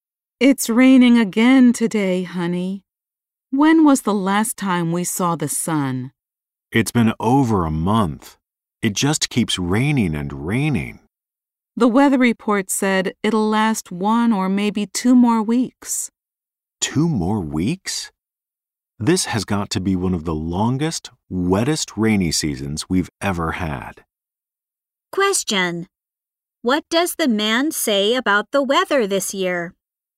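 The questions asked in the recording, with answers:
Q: What does the man say about the weather this year?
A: It has one of the longest, wettest rainy seasons they've ever had.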